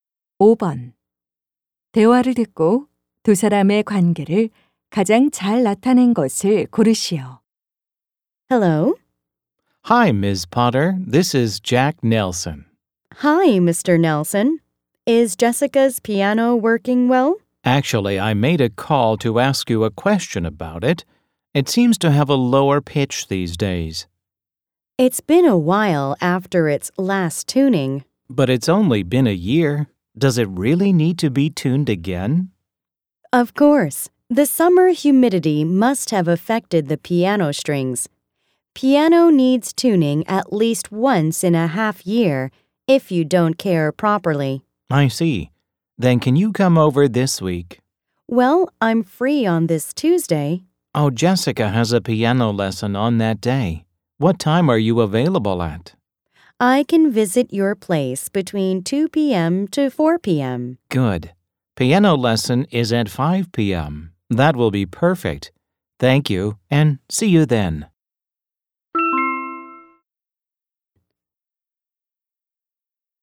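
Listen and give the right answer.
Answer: 피아노 조율사 - 고객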